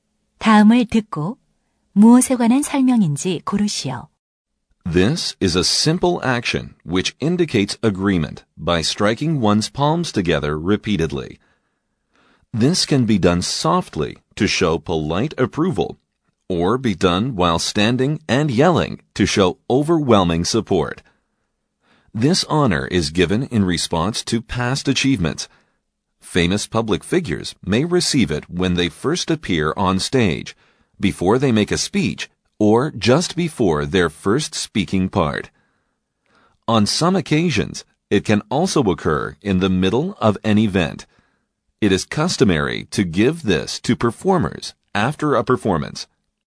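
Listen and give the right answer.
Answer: 박수 (applause)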